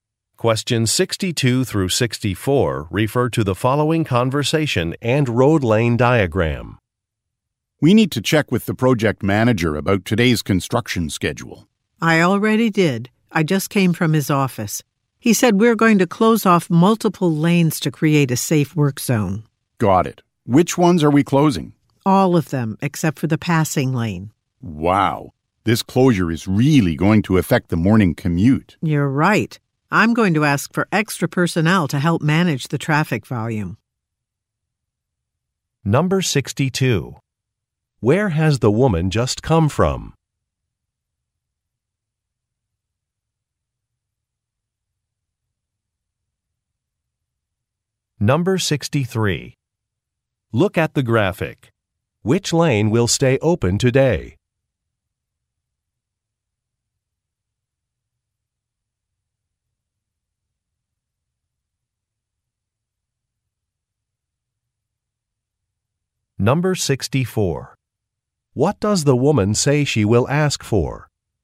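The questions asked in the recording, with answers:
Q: Where has the woman just come from?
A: The project manager's office

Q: What does the woman say she will ask for?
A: Extra personnel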